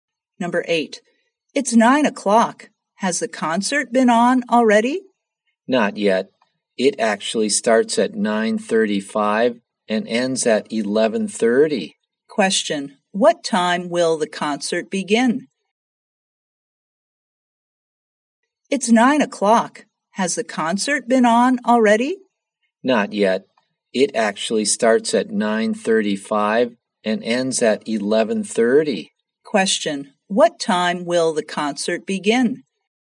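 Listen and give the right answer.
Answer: At 9:35.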